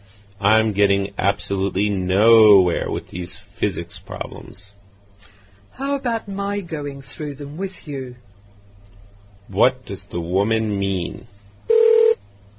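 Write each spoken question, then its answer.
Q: What does the woman mean?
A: She offers to help him with the physics problems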